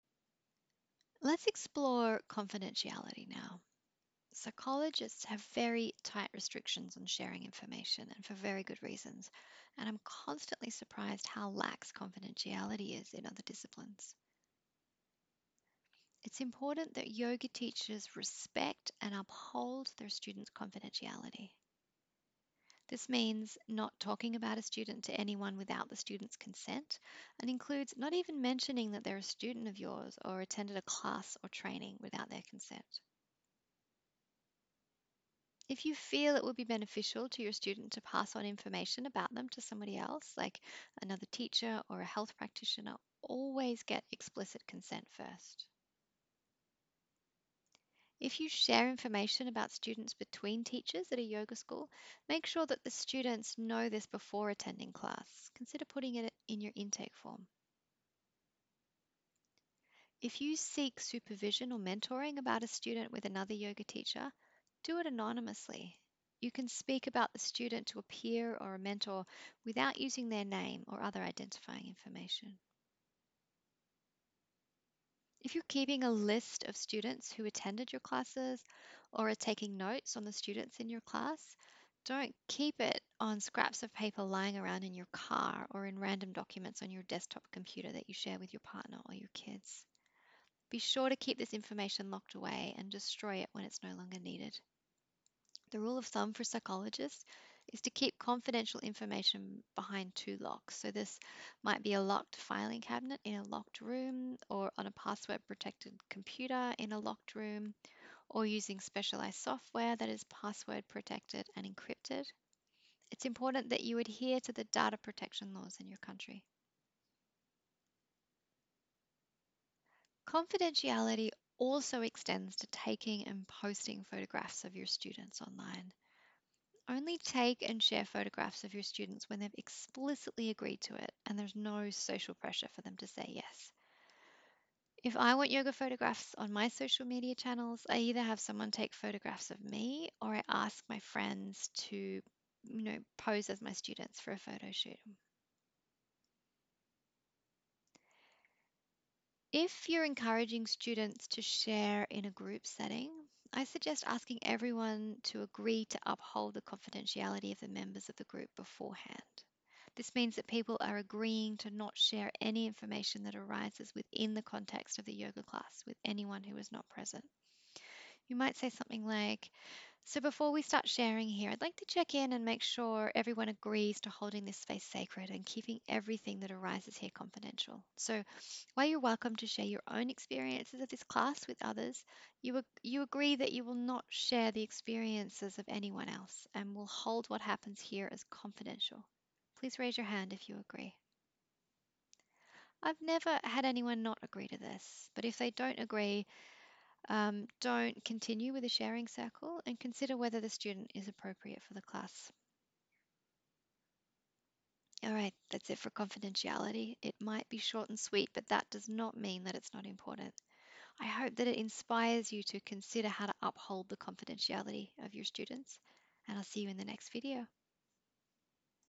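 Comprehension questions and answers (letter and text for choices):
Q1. Confidentiality for Yoga Teachers means:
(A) Not telling anyone that you're a Yoga Teacher.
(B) Confidentiality isn't really that important for Yoga Teachers.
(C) Not sharing information about a student with anyone without the student's consent.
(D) None of the above.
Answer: (C) Not sharing information about a student with anyone without the student's consent.

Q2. When sharing information about a student with another teacher at the studio you teach at:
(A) Just go ahead and do it, there's no need to get consent as you're working at the same studio.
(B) Ensure that you have consent from the student, either verbal consent or signed consent on the intake form.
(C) You should never pass on any information about any student.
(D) None of the above.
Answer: (B) Ensure that you have consent from the student, either verbal consent or signed consent on the intake form.

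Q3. What is best practice for storing student intake forms?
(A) In a secure location, either locked in a filing cabinet in a locked room or in secure and password protected software on a password protected computer.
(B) In an unlocked cupboard in the yoga studio.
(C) In a folder on the back seat of your car.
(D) All of the above.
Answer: (A) In a secure location, either locked in a filing cabinet in a locked room or in secure and password protected software on a password protected computer.

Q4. When inviting students to share in a group setting, asking everyone to uphold the confidentiality of the others in the group is:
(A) A waste of time, no one is going to do it anyway.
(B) Overly formal and unnecessary.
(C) Important to create a safe container for the students.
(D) None of the above.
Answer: (C) Important to create a safe container for the students.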